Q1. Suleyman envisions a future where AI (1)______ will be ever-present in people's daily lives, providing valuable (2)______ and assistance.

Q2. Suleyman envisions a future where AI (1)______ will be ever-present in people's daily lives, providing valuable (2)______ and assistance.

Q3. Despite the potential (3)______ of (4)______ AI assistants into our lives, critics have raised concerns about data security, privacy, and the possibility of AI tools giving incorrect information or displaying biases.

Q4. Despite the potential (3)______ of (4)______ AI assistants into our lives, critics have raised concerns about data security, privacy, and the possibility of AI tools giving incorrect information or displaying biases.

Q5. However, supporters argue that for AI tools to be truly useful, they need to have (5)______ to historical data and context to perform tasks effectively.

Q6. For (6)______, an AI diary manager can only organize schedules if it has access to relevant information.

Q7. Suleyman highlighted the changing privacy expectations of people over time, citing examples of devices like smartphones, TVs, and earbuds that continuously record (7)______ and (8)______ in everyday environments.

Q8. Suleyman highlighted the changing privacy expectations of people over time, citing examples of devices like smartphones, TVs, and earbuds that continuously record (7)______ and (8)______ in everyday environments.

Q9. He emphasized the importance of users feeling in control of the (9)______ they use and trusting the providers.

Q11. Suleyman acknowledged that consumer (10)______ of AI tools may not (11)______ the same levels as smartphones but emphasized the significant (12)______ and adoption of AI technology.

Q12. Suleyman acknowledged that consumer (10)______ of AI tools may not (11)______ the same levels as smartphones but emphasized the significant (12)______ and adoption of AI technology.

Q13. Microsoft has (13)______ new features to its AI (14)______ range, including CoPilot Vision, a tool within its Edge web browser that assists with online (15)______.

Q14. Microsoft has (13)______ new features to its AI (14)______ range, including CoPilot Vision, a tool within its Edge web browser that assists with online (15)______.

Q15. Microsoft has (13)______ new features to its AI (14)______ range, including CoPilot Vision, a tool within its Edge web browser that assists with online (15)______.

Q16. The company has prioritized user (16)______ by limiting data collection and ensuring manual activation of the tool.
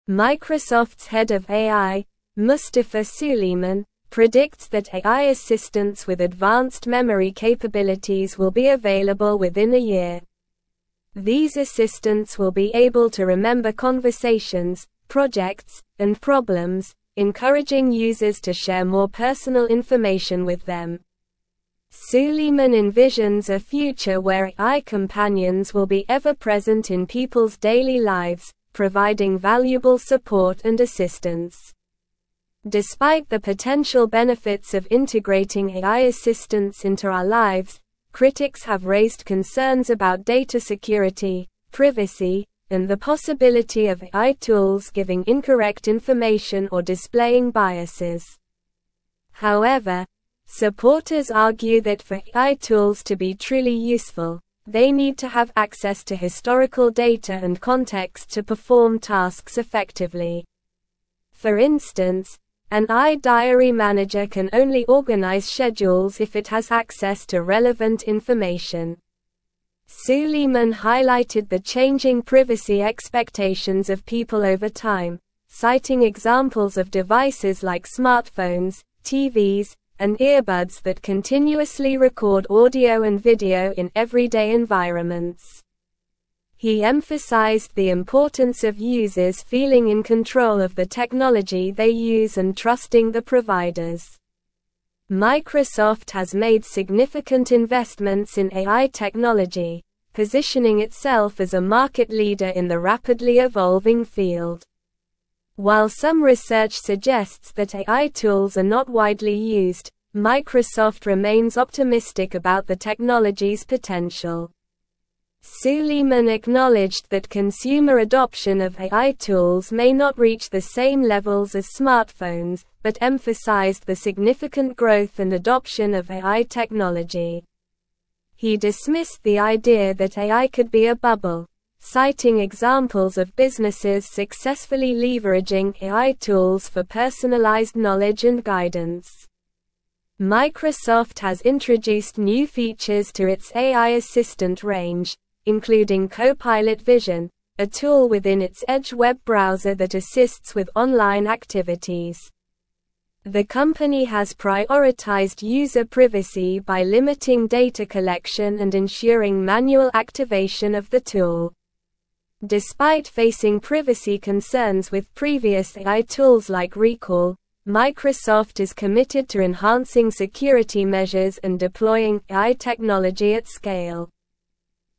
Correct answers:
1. companions
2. support
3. benefits
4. integrating
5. access
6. instance
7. audio
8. video
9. technology
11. reach
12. growth
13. introduced
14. assistant
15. activities
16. privacy

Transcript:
Microsoft's head of AI, Mustafa Suleyman, predicts that AI assistants with advanced memory capabilities will be available within a year. These assistants will be able to remember conversations, projects, and problems, encouraging users to share more personal information with them. Suleyman envisions a future where AI companions will be ever-present in people's daily lives, providing valuable support and assistance.
Despite the potential benefits of integrating AI assistants into our lives, critics have raised concerns about data security, privacy, and the possibility of AI tools giving incorrect information or displaying biases. However, supporters argue that for AI tools to be truly useful, they need to have access to historical data and context to perform tasks effectively. For instance, an AI diary manager can only organize schedules if it has access to relevant information.
Suleyman highlighted the changing privacy expectations of people over time, citing examples of devices like smartphones, TVs, and earbuds that continuously record audio and video in everyday environments. He emphasized the importance of users feeling in control of the technology they use and trusting the providers. Microsoft has made significant investments in AI technology, positioning itself as a market leader in the rapidly evolving field.
While some research suggests that AI tools are not widely used, Microsoft remains optimistic about the technology's potential. Suleyman acknowledged that consumer adoption of AI tools may not reach the same levels as smartphones but emphasized the significant growth and adoption of AI technology. He dismissed the idea that AI could be a bubble, citing examples of businesses successfully leveraging AI tools for personalized knowledge and guidance.
Microsoft has introduced new features to its AI assistant range, including CoPilot Vision, a tool within its Edge web browser that assists with online activities. The company has prioritized user privacy by limiting data collection and ensuring manual activation of the tool. Despite facing privacy concerns with previous AI tools like Recall, Microsoft is committed to enhancing security measures and deploying AI technology at scale.

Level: Level 4